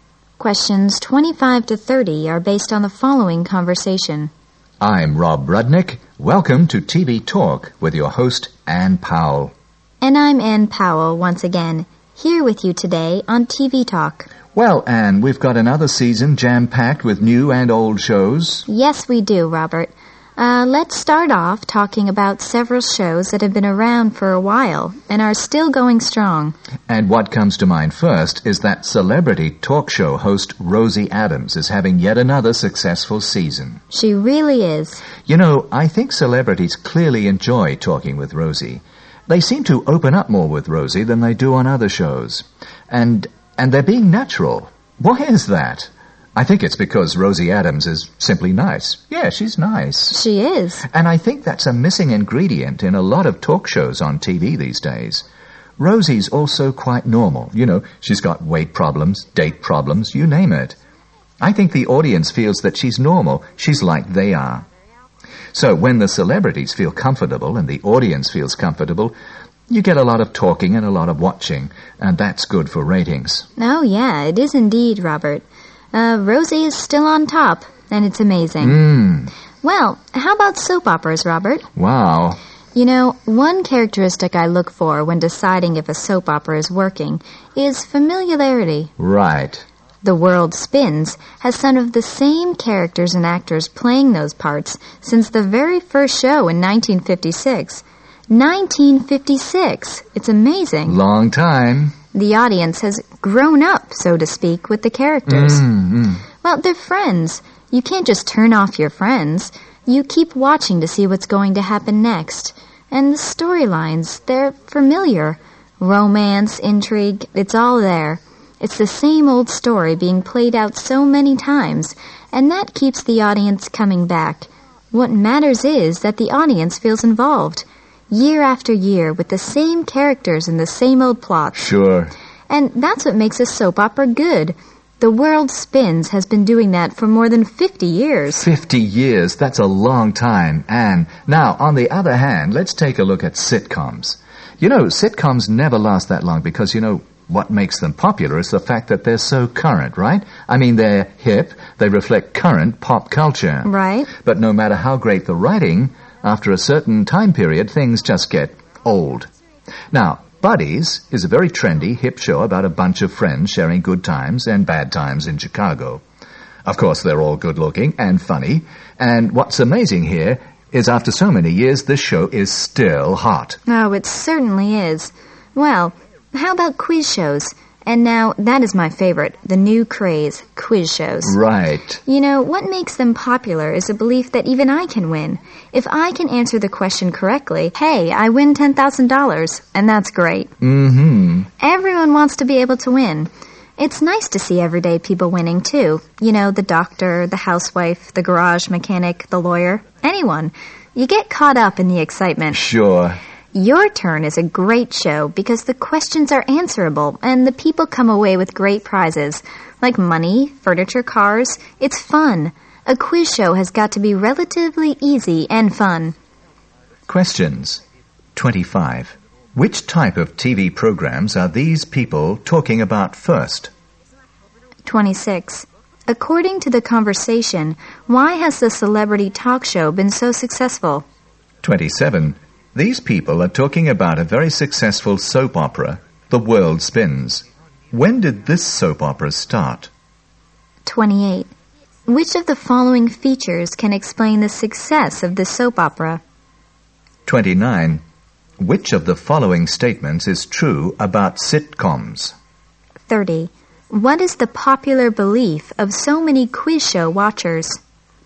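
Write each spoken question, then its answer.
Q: Which type of TV programs are these people talking about first?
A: Celebrity talk shows

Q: According to the conversation, why has the celebrity talk show been so successful?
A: Because the host, Rosie Adams, is nice and normal, so guests and the audience feel comfortable

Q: When did this soap opera start?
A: In 1956

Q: Which of the following features can explain the success of the soap opera?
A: Familiarity: the same characters and plots year after year, so the audience feels involved

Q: What is the popular belief of so many quiz show watchers?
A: That even they can win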